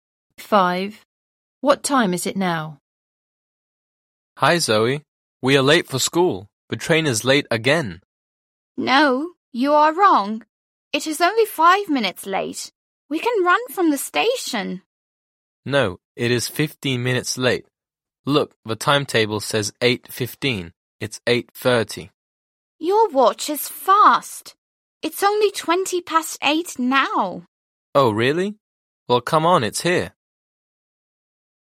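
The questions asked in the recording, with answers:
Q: What time is it now?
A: 8:20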